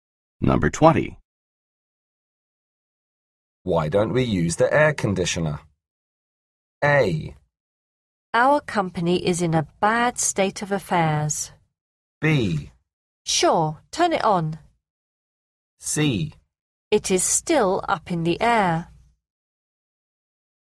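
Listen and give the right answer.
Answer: B: Sure, turn it on.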